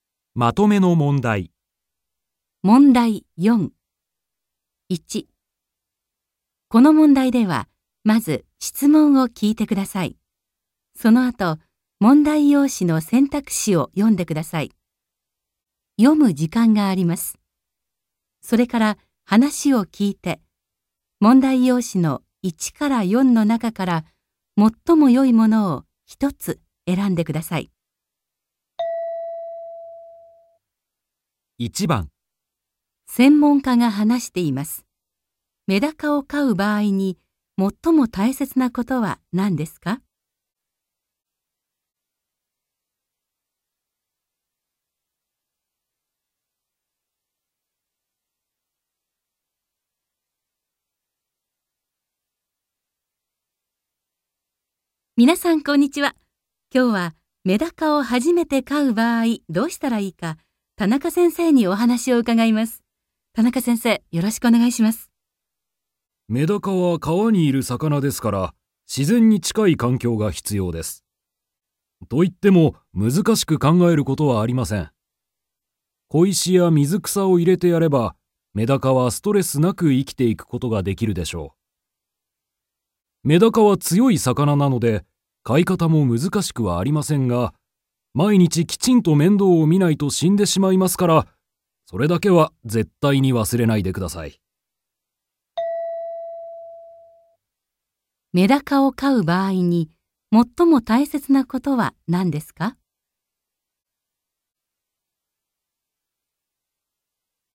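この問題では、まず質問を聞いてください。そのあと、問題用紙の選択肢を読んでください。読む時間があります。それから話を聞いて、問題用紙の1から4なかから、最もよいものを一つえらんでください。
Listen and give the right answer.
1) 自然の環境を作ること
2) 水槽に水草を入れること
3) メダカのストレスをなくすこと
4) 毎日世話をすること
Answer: 4) 毎日世話をすること

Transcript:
この問題では、まず質問を聞いてください。そのあと、問題用紙の選択肢を読んでください。それから話を聞いて、問題用紙の1から4なかから、最もよいものを一つえらんでください。
F: 皆さんこんにちは。今日はメダカを初めて飼う場合、どうしたらいいか、田中先生にお話を伺います。田中先生、よろしくお願いします。
M:メダカは川にいる魚ですから、自然に近い環境が必要です。といっても、難しく考えることはありません。小石や水草を入れてやれば、メダカはストレスなく生きていくことができるでしょう。メダカは強い魚なので、飼い方も難しくはありませんが、毎日きちんと面倒をみないと死んでしまいますから、それだけは絶対に忘れないでください。
メダカを飼う場合に、最も大切なことは何ですか。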